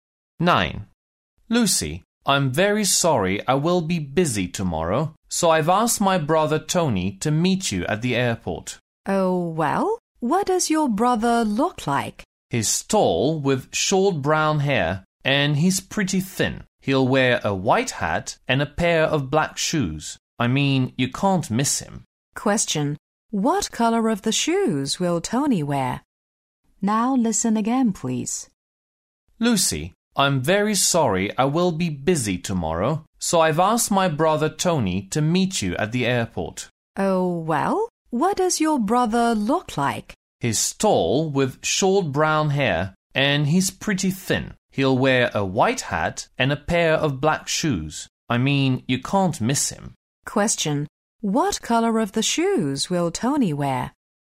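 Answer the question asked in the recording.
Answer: Black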